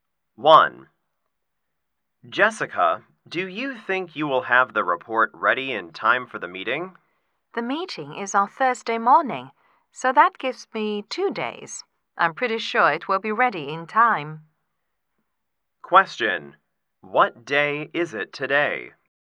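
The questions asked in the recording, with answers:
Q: What day is it today?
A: Tuesday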